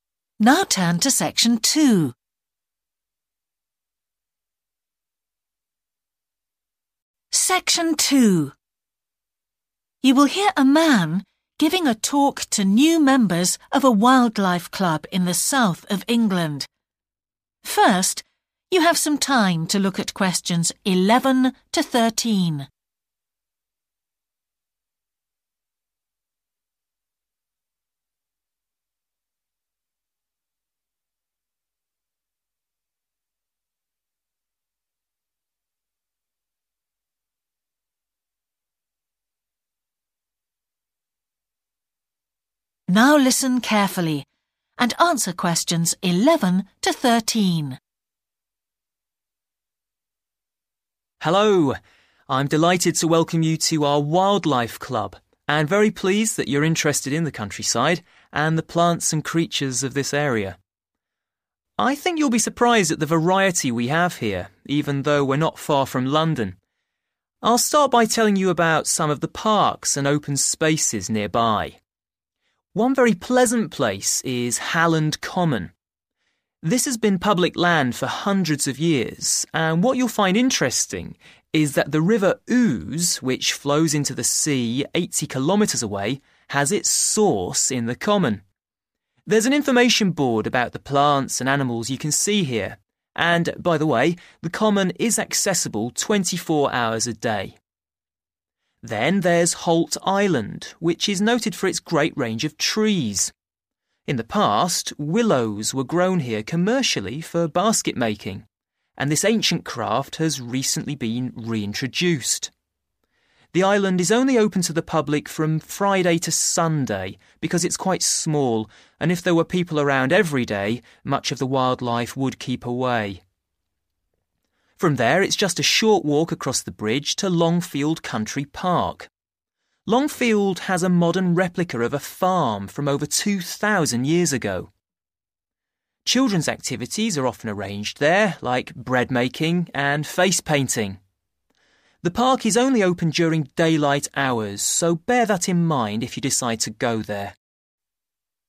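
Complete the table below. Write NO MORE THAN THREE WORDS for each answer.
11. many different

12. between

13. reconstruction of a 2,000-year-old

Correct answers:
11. trees
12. Friday and Sunday
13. farm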